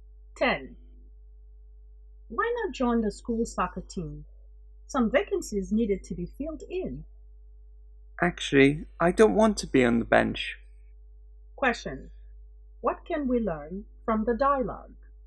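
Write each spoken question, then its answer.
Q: what can we learn from the dialogue?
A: The speaker doesn't want to join the team as a substitute sitting on the bench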